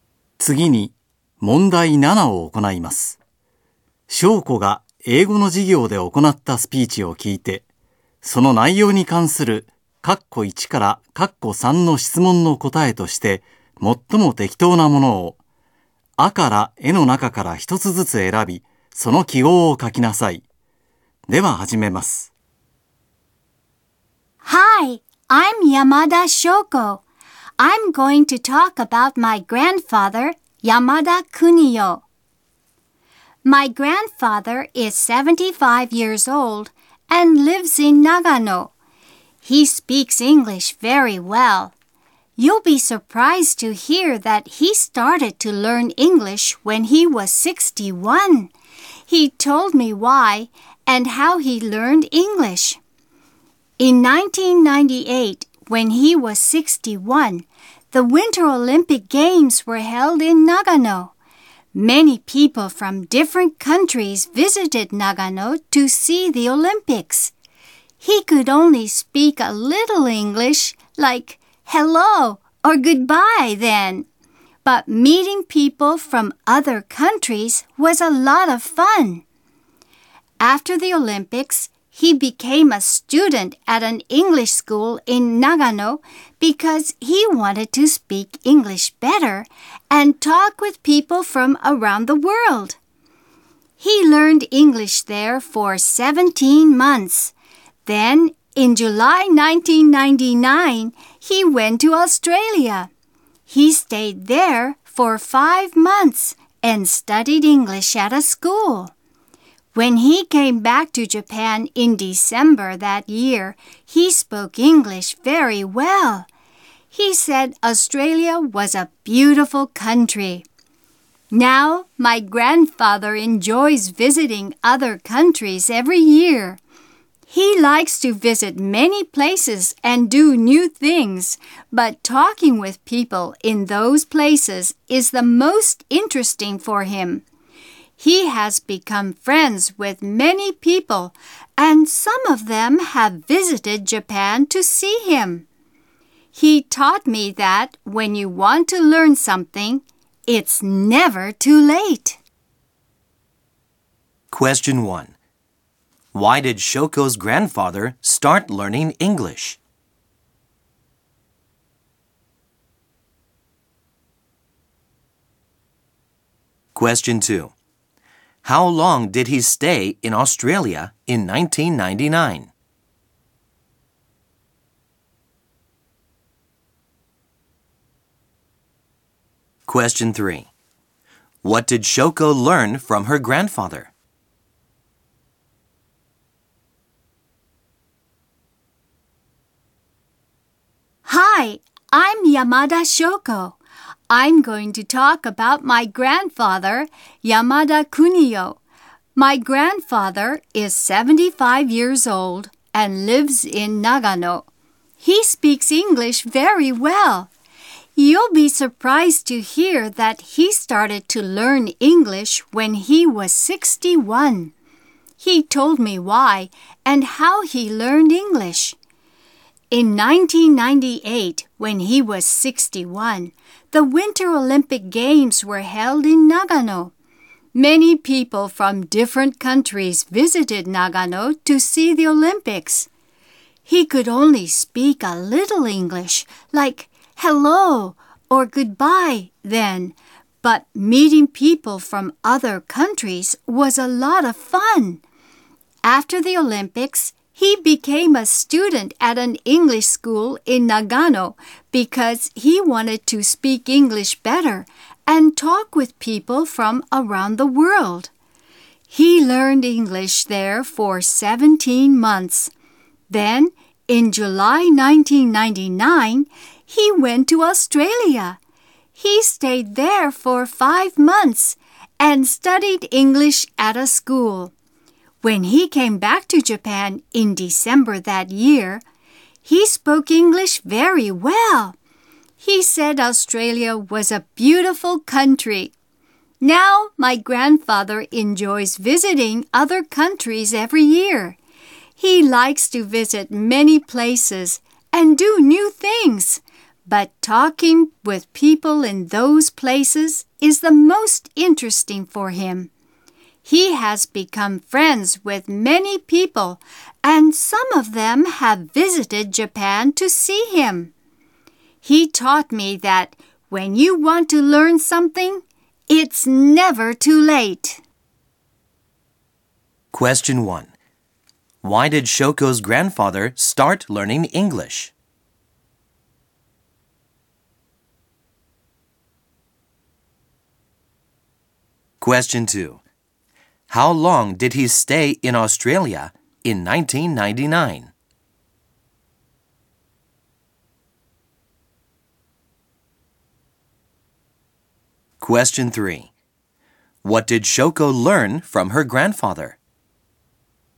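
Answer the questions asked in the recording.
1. He wanted to speak English better and talk with people from around the world, after enjoying meeting foreign visitors at the Nagano Olympics
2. For 5 months
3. When you want to learn something, it's never too late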